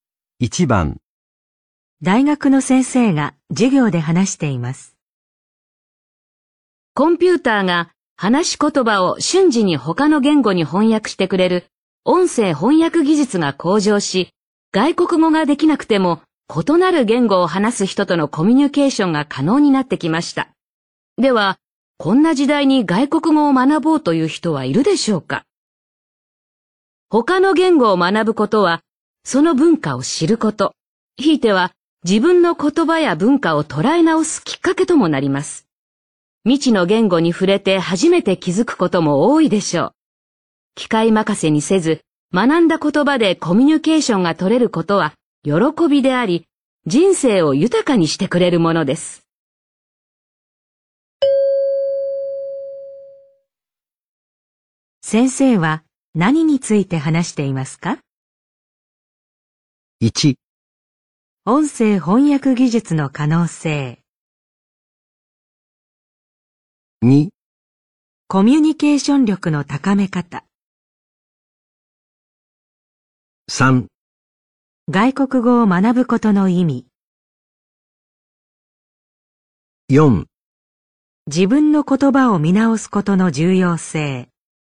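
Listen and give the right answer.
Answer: 3: 外国語を学ぶことの意味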